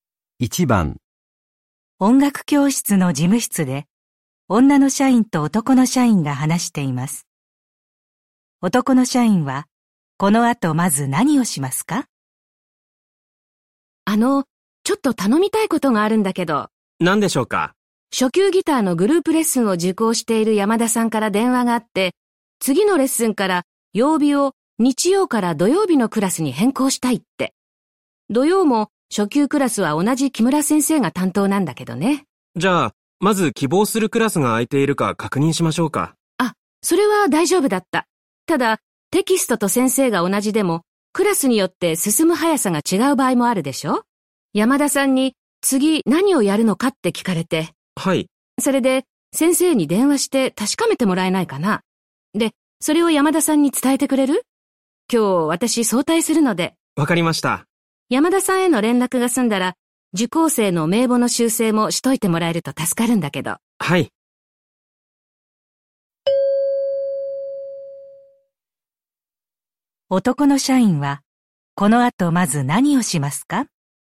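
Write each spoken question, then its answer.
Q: 男の社員は、この後まず何をしますか?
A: 先生に電話して次のレッスンの内容を確かめる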